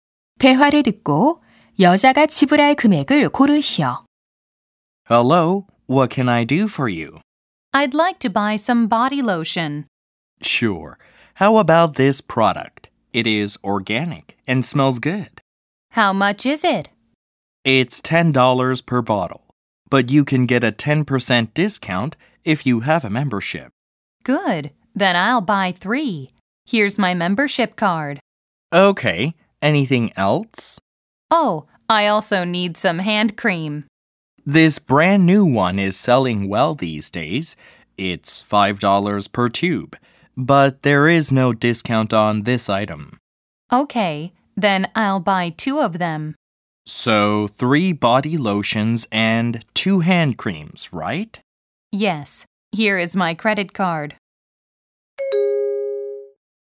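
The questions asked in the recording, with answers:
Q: 대화를 듣고 여자가 지불할 금액을 고르시오.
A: 37달러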